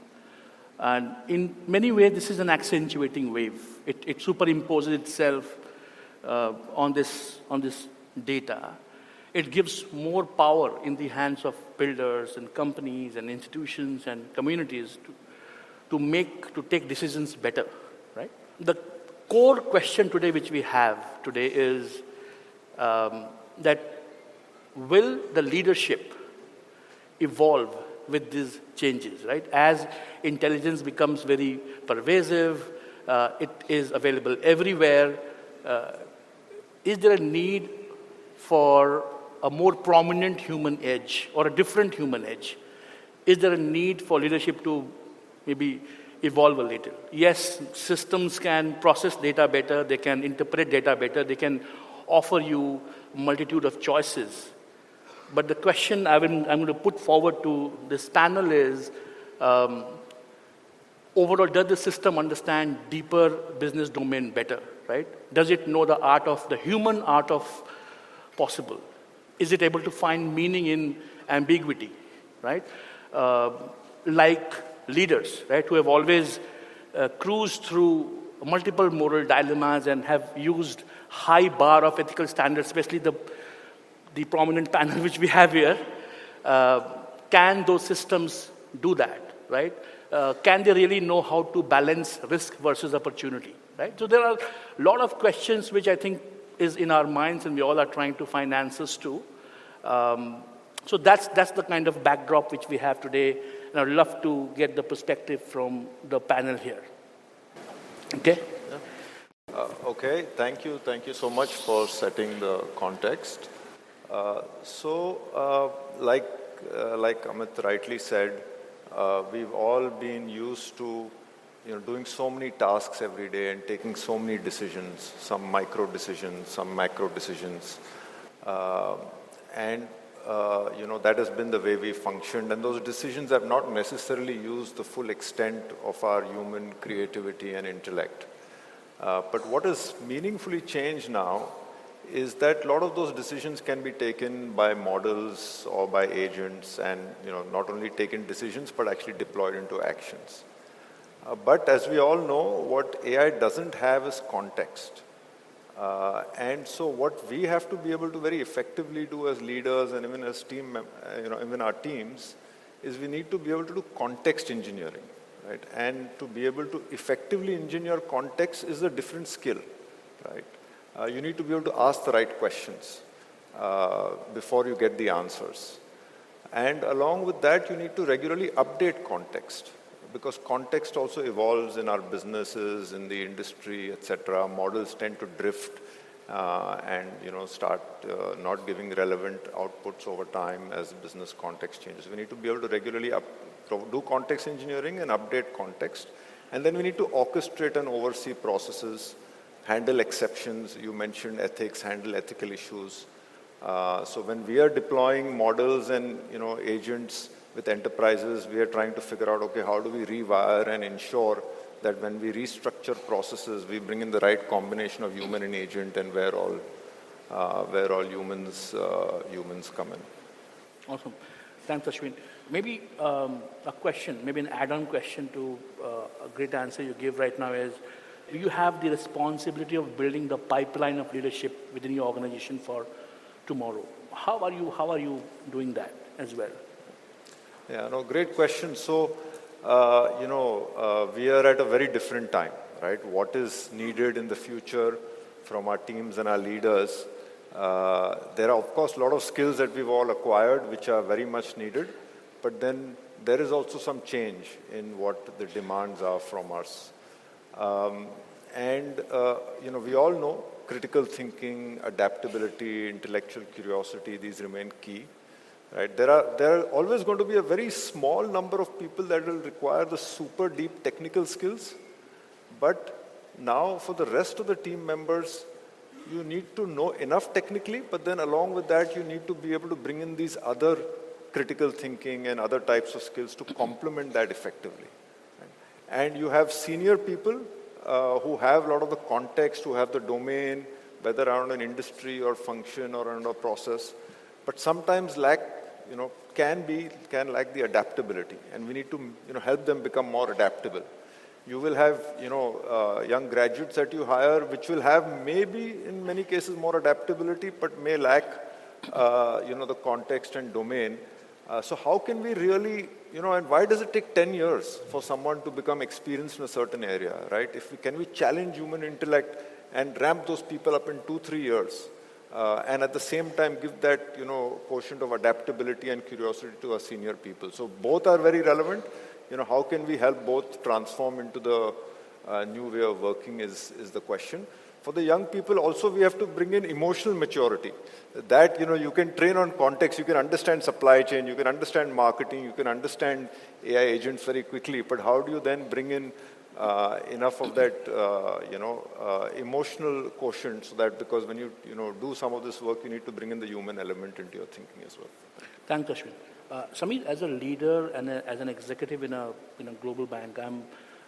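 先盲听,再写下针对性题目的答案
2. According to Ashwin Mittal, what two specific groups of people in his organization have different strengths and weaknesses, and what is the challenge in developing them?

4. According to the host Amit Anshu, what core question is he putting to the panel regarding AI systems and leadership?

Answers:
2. Senior people have context and domain knowledge but can lack adaptability; young graduates are more adaptable but lack context and domain. The challenge is to ramp young people up in two or three years instead of ten, and to give senior people adaptability and curiosity.
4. Whether leadership will evolve as intelligence becomes pervasive: does the system understand the deeper business domain better, find meaning in ambiguity, handle moral dilemmas and balance risk versus opportunity?

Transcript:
their customers and their markets better and they have been able to serve their customers
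in their best possible way or achieve those objectives which they have started to go
for.
Um Um or achieve those objectives which they have started to um uh goal for. uh goal for. What's also happening today, right, is that that this wave of intelligence which we all are seeing, which is which is
coming up. And in many way, this is an accentuating wave. It it superimposes itself uh on this on this [snorts] data. It gives more power in the hands of builders and companies and institutions and communities to and communities to to make to take decisions better, right? The The core question today which we have today is is um um that that will the leadership will the leadership evolve with these changes, right? As intelligence becomes very pervasive, uh it is available everywhere, is there a need for a
more prominent human edge or a different human edge? different human edge? Is there a need for leadership to maybe evolve a little? 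Yes, systems can process data better, they can interpret data better, they can offer you multitude of choices. >> [snorts] >> [snorts] >> But the question I've been I'm going to put forward to this panel is um um overall, does the system understand deeper business domain better, right? Does it know the art of the human art of possible? Is it able to find meaning in
ambiguity, right? Uh ambiguity, right? Uh like leaders, right? Who have always uh cruised through multiple moral dilemmas and have used high bar of ethical standards, especially the standards, especially the the prominent panel which we have here. Uh Uh can those systems do that, right? Uh can they really know how to balance risk versus opportunity, right? So, there are lot of questions which I think is in our minds and we all are trying to find answers to. answers to. Um so, that's that's the kind of backdrop
Now, I'd love to get the perspective from the panel here. 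Okay. Okay. Uh okay. Thank you. Thank you so much for setting the context. Uh so, uh like like Amit rightly said, uh we've all been used to, you know, doing so many tasks every day and taking so many decisions, some micro decisions, some macro decisions. Uh Uh and and uh you know, that has been the way we functioned and those decisions have not necessarily used the full extent of our human creativity
and intellect. Uh but what has meaningfully changed now is that lot of those decisions can be taken by models or by agents and, you know, not only taken decisions, but actually deployed into actions. Uh but as we all know, what AI doesn't have is context. Uh Uh and so, what we have to be able to very effectively do as leaders and even as team you know, even our teams, is we need to be able to do context engineering, right? And to be able to effectively engineer
context is a different skill, right? 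Uh you need to be able to ask the right questions uh before you get the answers. And along with that, you need to regularly update context because context also evolves in our businesses, in the industry, etc. Models tend to drift uh and, you know, start uh not giving relevant outputs over time as business context changes. And then we need to orchestrate and oversee processes, handle exceptions.
You mentioned ethics, handle ethical issues. handle ethical issues. Uh so, when we are deploying models and, you know, agents with enterprises, we're trying to figure out, okay, how do we rewire and ensure that when we restructure processes, we bring in the right combination of human and agent and where all where all uh where all humans uh humans come in. Awesome. Thanks, Ashwin. Maybe um a question, maybe an add-on question to uh a great answer you gave right now is, do you have the responsibility of building
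the pipeline of leadership within your organization for tomorrow? How are you How are you doing that as well? Yeah, no, great question. So, uh you know, uh we are at a very different time, right? What is needed in the future from our teams and our leaders, uh there are of course a lot of skills that we've all acquired, which are very much needed. But then, there is also some change in what the demands are from us. us.
critical thinking, adaptability, intellectual thinking, adaptability, intellectual curiosity, these remain key. Right? There are There are always going to be a very small number of people that will require the super deep technical skills. skills. But now, for the rest of the team members, members, you need to know enough technically, but then along with that, you need to be able to bring in these other critical thinking and other types of skills to complement that effectively. 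complement that effectively. And you have senior people uh who have a lot
of the context, who have the domain, whether around an industry or function or around a process, but sometimes lack, you know, can be can lack the adaptability. And we need to, you know, help them become more adaptable. You will have, you know, uh young graduates that you hire which will have, maybe, in many cases more adaptability, but may lack uh you know, the context and domain. Uh so, how can we really, you know, and why does it take 10 years for someone to become experienced in
a certain area, right? If we can we challenge human intellect and ramp those people up in 2-3 years? Uh and at the same time give that, you know, quotient of adaptability and curiosity to our senior people. So, both are very relevant. You know, how can we help both transform into the uh new way of working is is the question. For the young people, also we have to bring in emotional maturity. 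Uh that, you know, you can train on context, you can understand supply chain, you can
understand marketing, you can understand AI agents very quickly. But, how do you then bring in uh enough of that uh you know, uh emotional quotient so that because when you, you know, do some of this work in need to bring in the human element into your thinking as well. Thank Ashwin.
But how do you then bring in enough of that, you know, emotional quotient so that because when you, you know, do some of this work, you need to bring in the human element into your thinking as well.
Thanks, Ashwin.

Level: CEFRC1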